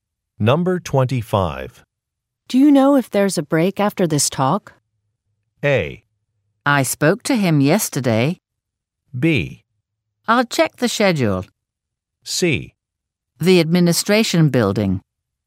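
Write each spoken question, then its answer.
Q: Do you know if there's a break after this talk?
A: B: I'll check the schedule.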